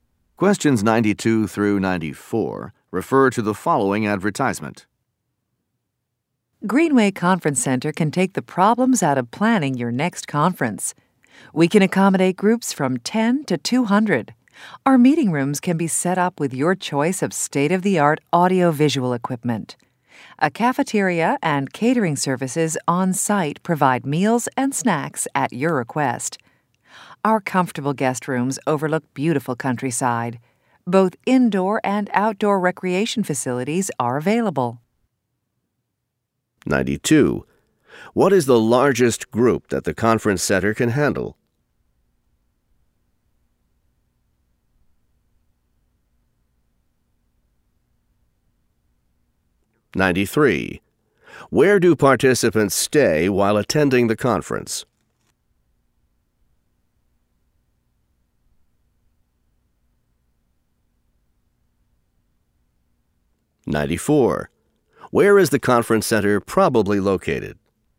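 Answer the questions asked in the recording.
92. 200
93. In guest rooms at the center
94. In the countryside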